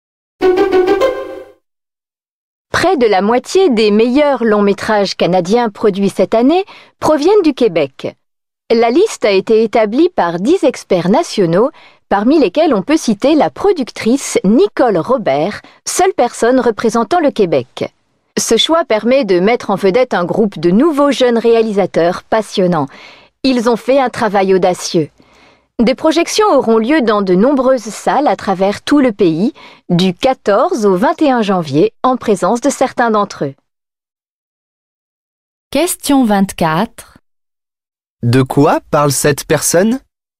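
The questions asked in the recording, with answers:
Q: De quoi parle cette personne?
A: D'une liste des meilleurs films canadiens de l'année, dont près de la moitié viennent du Québec.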